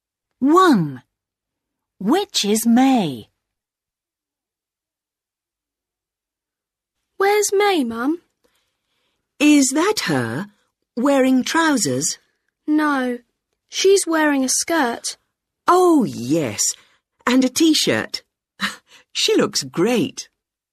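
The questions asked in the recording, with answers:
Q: Which is May?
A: The girl wearing a skirt and a T-shirt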